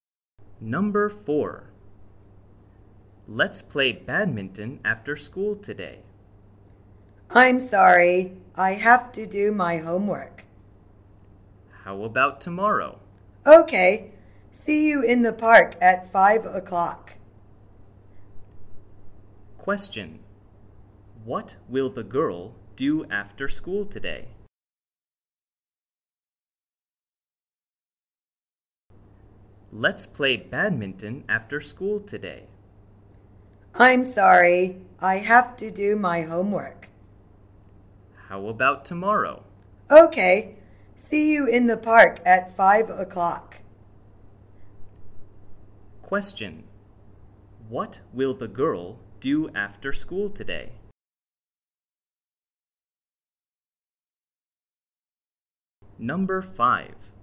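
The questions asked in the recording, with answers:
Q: What will the girl do after school today?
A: Do her homework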